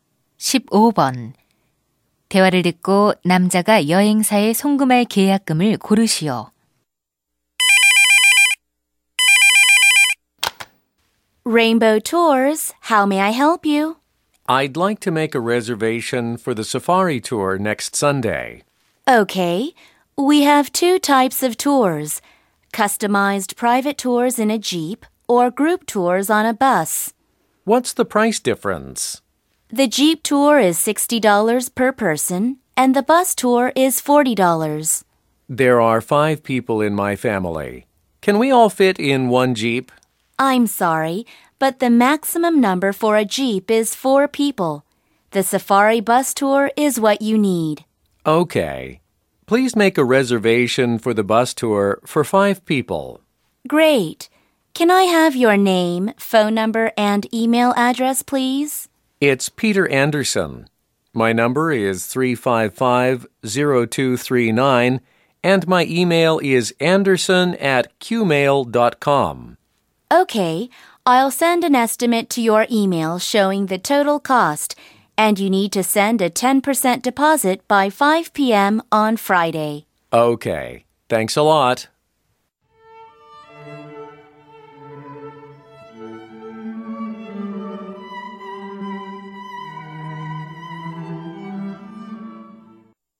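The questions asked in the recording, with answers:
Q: 대화를 듣고 남자가 여행사에 송금할 계약금을 고르시오.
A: 20달러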